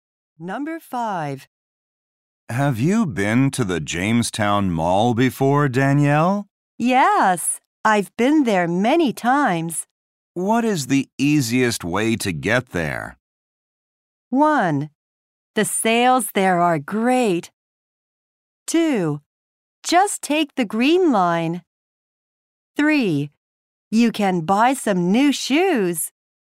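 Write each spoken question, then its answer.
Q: What is the easiest way to get there?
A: 2: Just take the green line.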